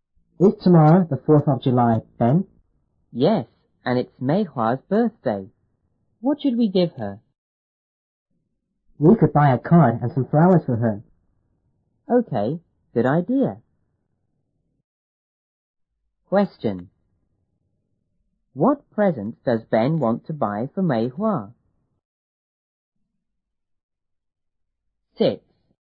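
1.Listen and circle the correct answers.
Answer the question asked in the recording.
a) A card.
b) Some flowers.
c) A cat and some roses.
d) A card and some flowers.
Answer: d) A card and some flowers.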